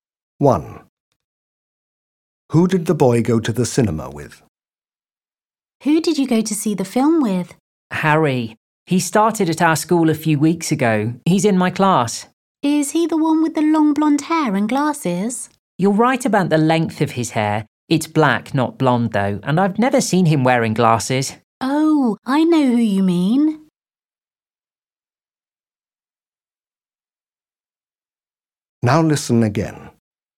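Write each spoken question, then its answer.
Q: Who did the boy go to the cinema with?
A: Harry, a boy with long black hair and no glasses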